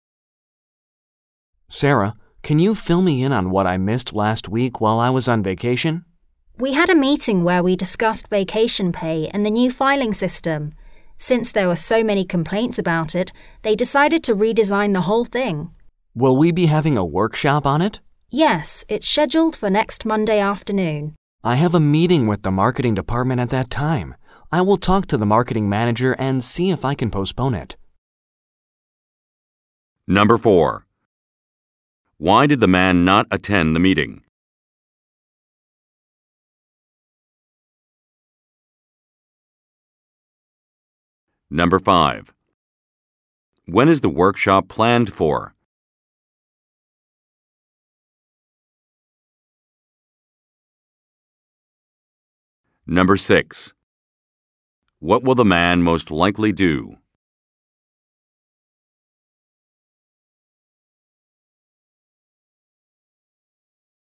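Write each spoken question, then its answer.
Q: Why did the man not attend the meeting?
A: He was on vacation.

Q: When is the workshop planned for?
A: Next Monday afternoon.

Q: What will the man most likely do?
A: Talk to the marketing manager about postponing his meeting.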